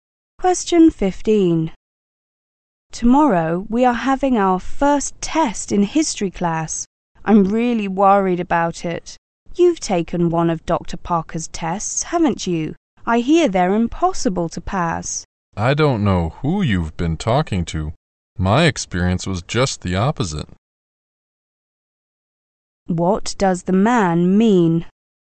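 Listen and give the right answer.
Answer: Dr. Parker's tests are not impossible to pass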